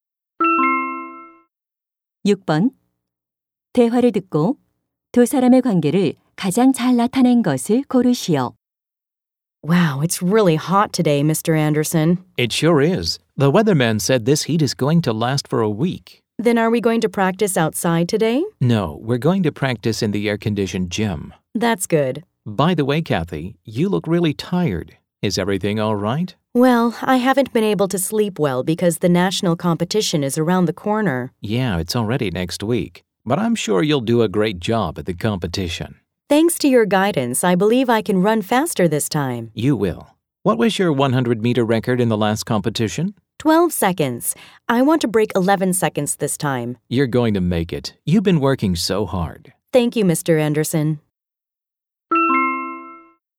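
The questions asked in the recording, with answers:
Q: 대화를 듣고 두 사람의 관계를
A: 육상 코치와 선수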